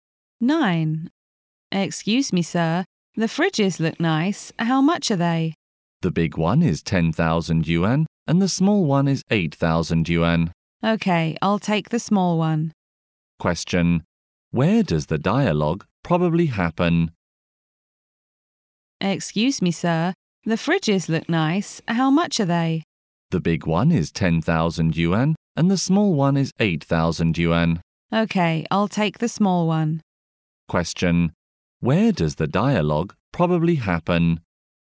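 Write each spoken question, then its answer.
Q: Where does the dialogue probably happen?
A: In a shop selling electrical appliances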